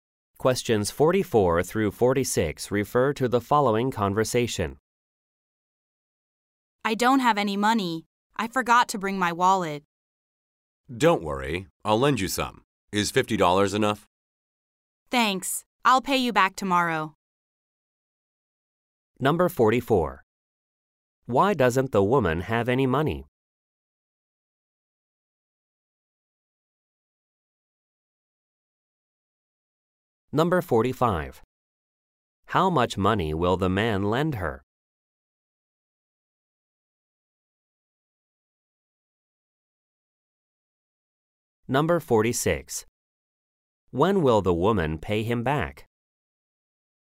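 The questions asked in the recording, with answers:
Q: Why doesn't the woman have any money?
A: She forgot her wallet

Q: How much money will the man lend her?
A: $50

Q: When will the woman pay him back?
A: Tomorrow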